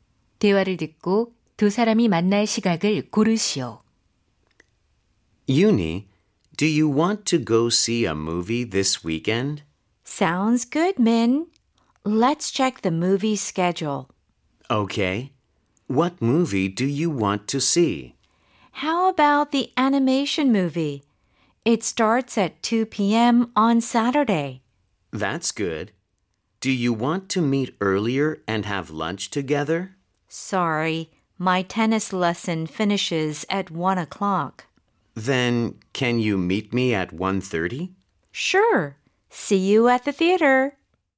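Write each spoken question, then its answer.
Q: 대화를 듣고 두 사람이 만날 시각을 고르시오.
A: 1시 30분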